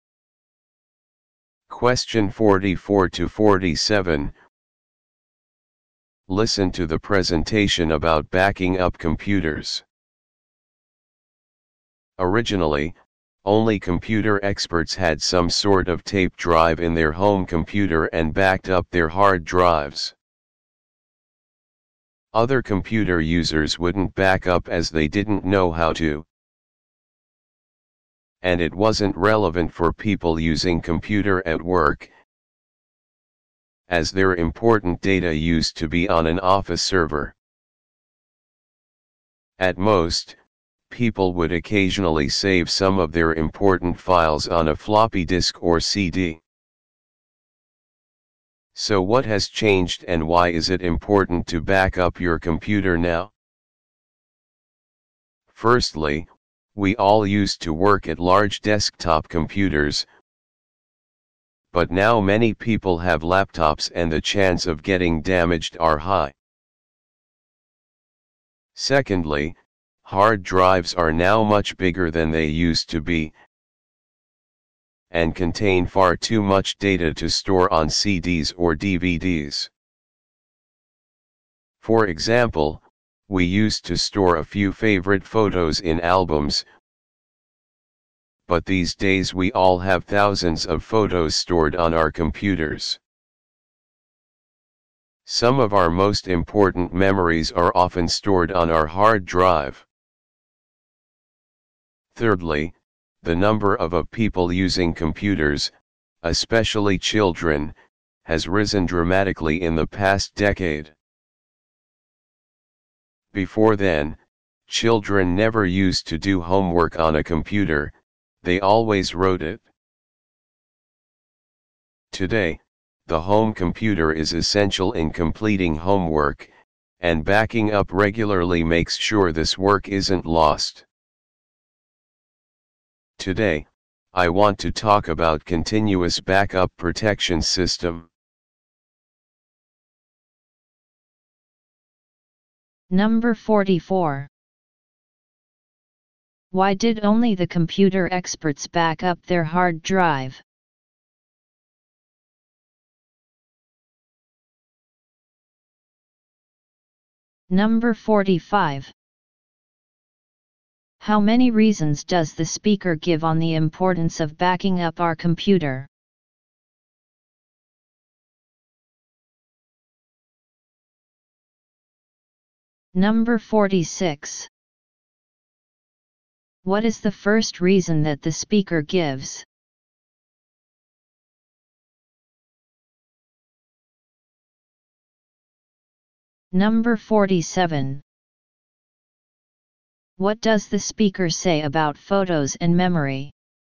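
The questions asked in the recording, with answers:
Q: How many reasons does the speaker give on the importance of backing up our computer?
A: Three

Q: What is the first reason that the speaker gives?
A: Many people now use laptops, which are more likely to get damaged

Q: What does the speaker say about photos and memory?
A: Thousands of photos and important memories are stored on our hard drives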